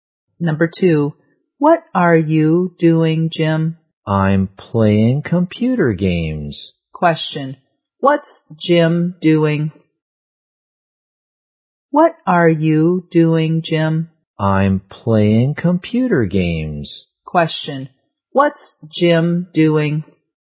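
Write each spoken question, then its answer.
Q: what's Jim doing?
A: Playing computer games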